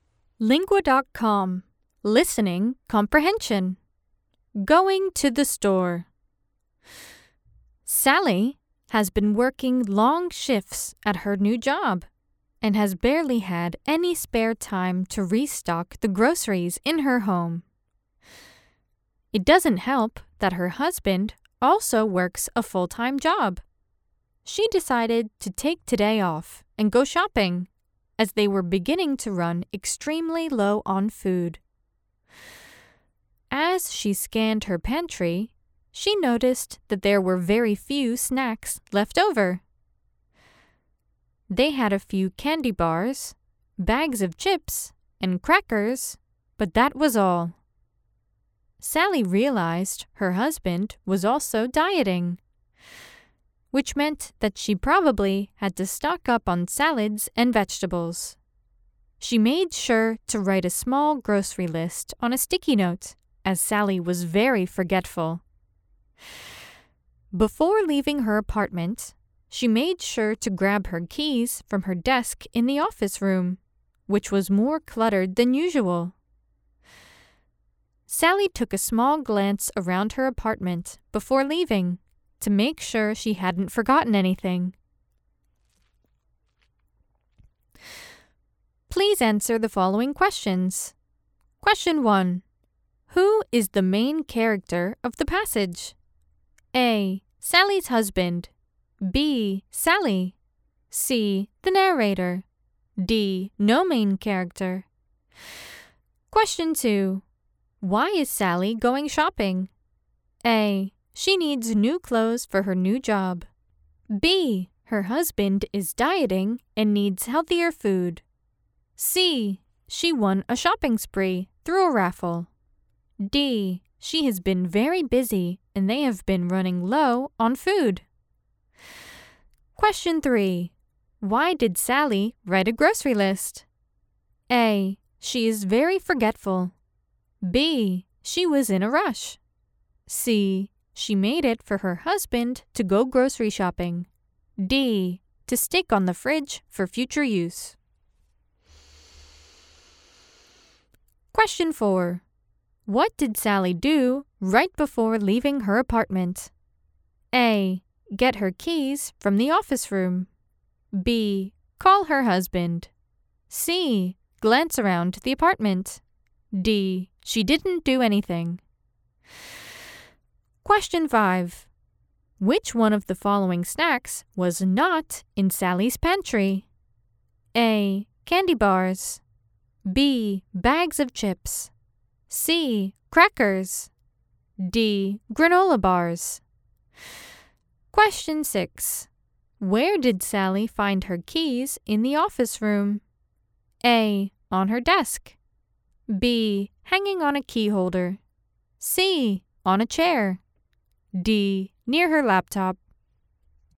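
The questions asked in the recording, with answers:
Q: Who is the main character of the passage?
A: B: Sally.

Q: Why is Sally going shopping?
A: D: She has been very busy and they have been running low on food.

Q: Why did Sally write a grocery list?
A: A: She is very forgetful.

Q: Which one of the following snacks was not in Sally's pantry?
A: D: Granola bars.

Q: Where did Sally find her keys in the office room?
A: A: On her desk.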